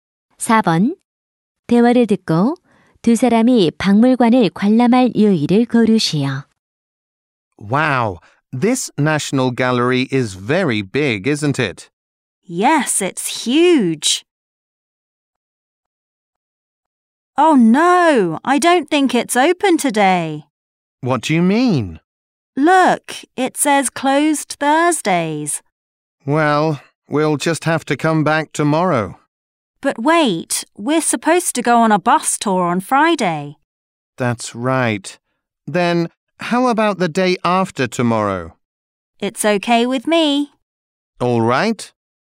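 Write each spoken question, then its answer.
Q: 대화를 듣고 두 사람이 박물관을 관람할 요일을 고르시오.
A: 토요일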